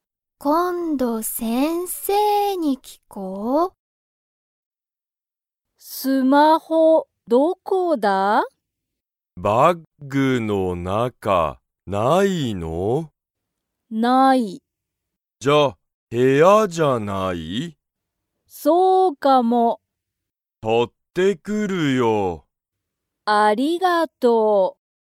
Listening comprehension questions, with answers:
Comprehension Quiz (Skip if you don't understand the conversation yet)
サヤカの____が無(な)い。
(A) 部屋(へや)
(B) バッグ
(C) スマホ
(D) 会社(かいしゃ)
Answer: (C) スマホ

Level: Level 1

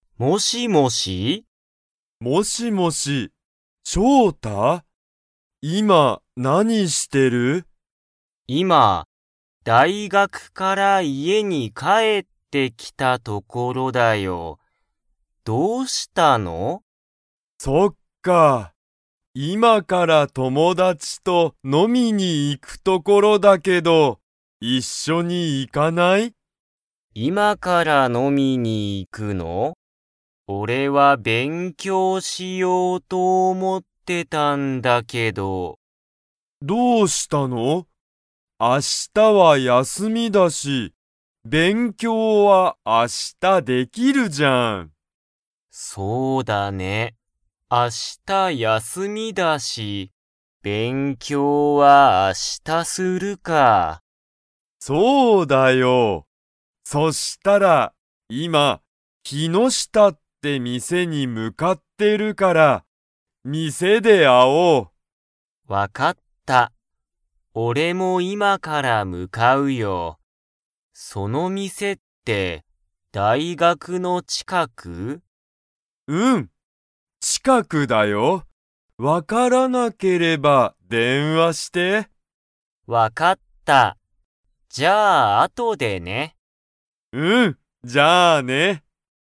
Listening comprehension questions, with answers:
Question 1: しょうたは、今(いま)からたくみと____に行いく。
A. 大学(だいがく)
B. 電話(でんわ)をし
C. 仕事(しごと)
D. 飲(の)み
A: D. 飲(の)み

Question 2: キノシタという店(みせ)は、大学(だいがく)の近(ちか)くですか?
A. はい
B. いいえ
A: A. はい

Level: Level 2

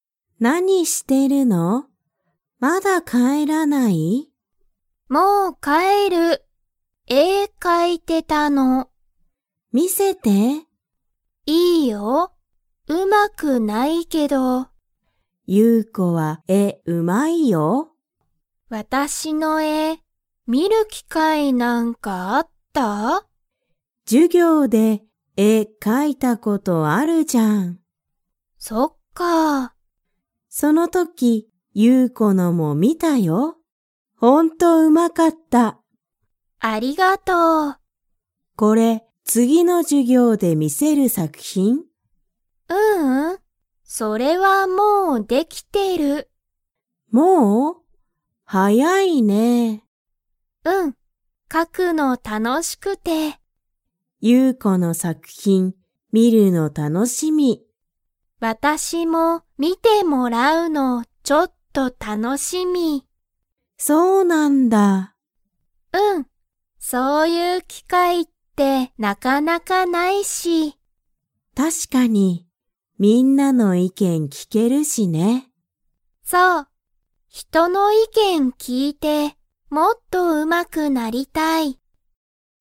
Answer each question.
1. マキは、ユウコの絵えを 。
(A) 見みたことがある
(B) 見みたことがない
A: (A) 見みたことがある

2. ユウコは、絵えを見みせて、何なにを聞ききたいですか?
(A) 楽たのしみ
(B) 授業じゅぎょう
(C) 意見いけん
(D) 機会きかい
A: (C) 意見いけん

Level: Level 3

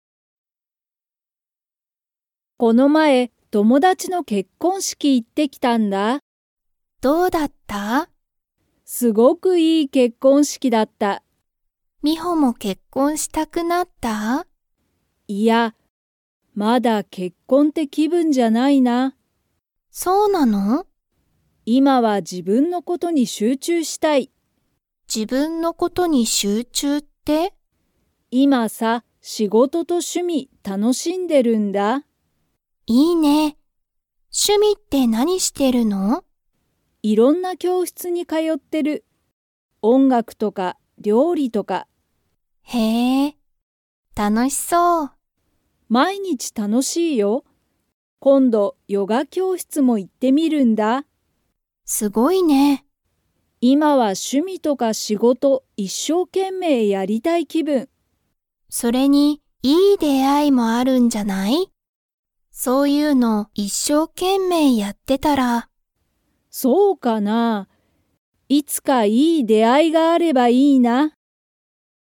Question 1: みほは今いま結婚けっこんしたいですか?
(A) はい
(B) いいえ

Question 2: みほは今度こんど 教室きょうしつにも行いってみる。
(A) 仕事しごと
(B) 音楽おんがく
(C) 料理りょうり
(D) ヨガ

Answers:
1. (B) いいえ
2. (D) ヨガ

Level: Level 4

